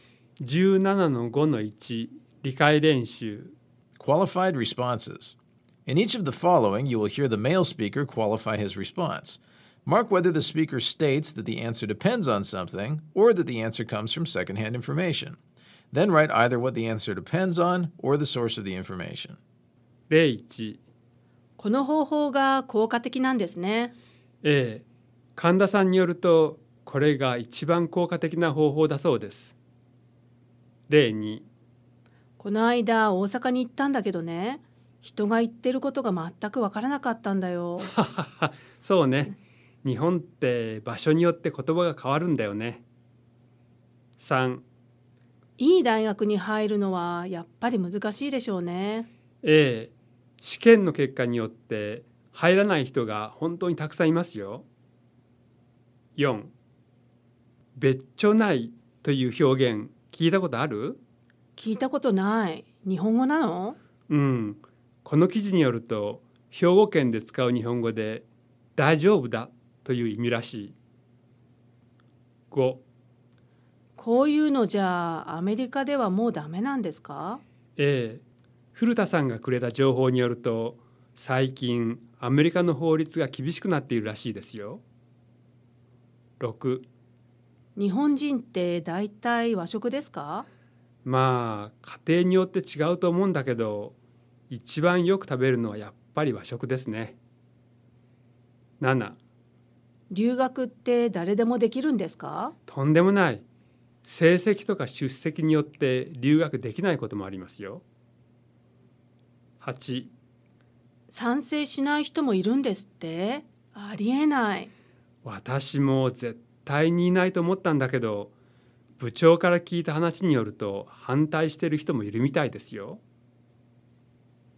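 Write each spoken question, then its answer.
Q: いい大学に入るのはやっぱり難しいでしょうね。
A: 依存:試験の結果

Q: 別所ないという表現聞いたことある?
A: 伝聞:この記事

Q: こういうのじゃあアメリカではもうダメなんですか?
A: 伝聞:古田さんがくれた情報

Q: 日本人って大体和食ですか?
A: 依存:家庭

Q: 留学って誰でもできるんですか?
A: 依存:成績とか出席

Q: 賛成しない人もいるんですって?ありえない。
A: 伝聞:部長から聞いた話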